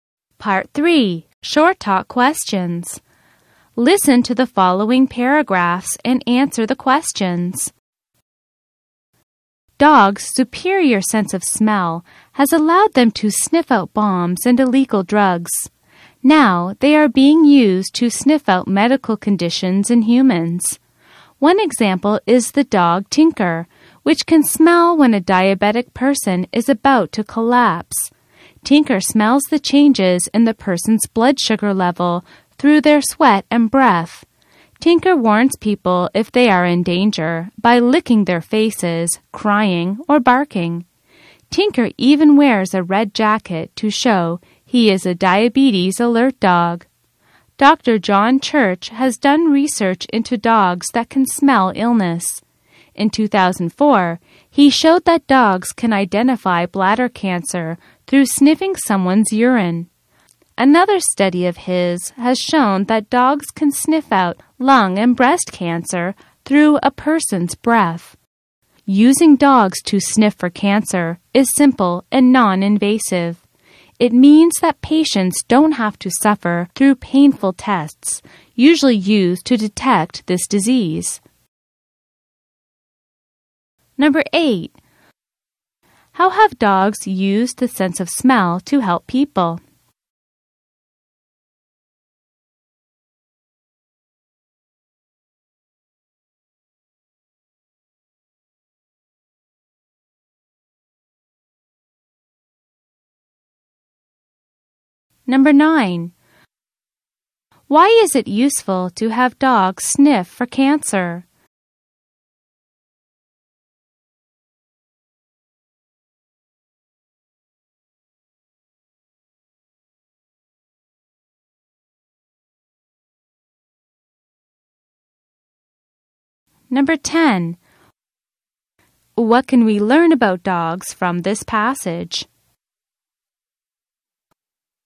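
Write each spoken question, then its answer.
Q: How have dogs used the sense of smell to help people?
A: By sniffing out bombs, drugs and medical conditions like diabetes and cancer.

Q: Why is it useful to have dogs sniff for cancer?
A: It is simple and non-invasive, so patients avoid painful tests.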